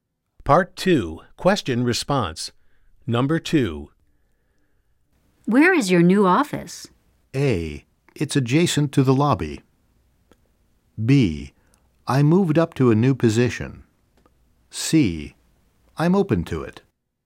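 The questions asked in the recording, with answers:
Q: Where is your new office?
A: A: It's adjacent to the lobby.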